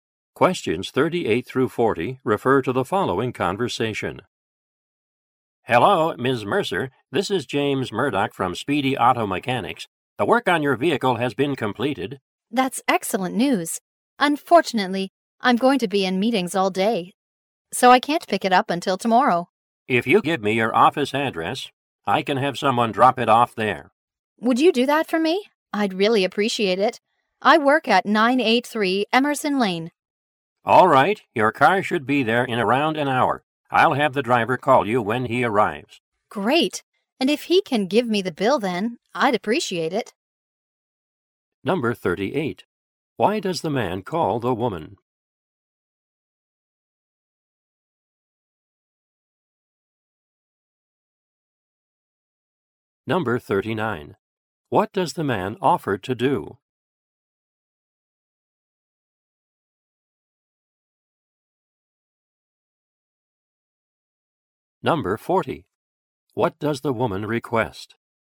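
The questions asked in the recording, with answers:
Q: Why does the man call the woman?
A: To tell her the work on her car is completed

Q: What does the man offer to do?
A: Have her car dropped off at her office

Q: What does the woman request?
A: That the driver give her the bill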